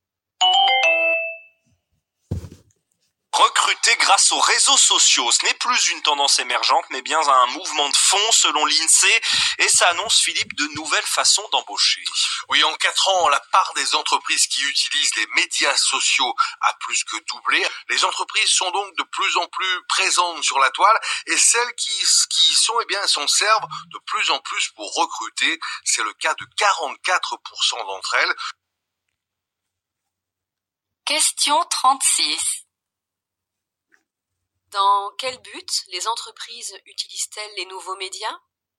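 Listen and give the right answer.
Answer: Pour recruter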